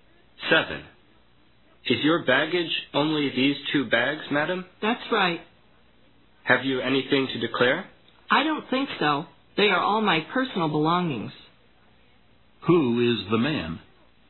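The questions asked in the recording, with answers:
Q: Who is the man?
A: A customs officer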